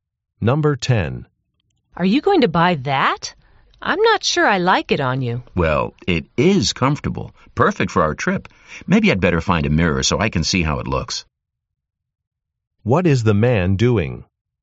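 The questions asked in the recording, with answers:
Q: What is the man doing?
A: Trying on clothes.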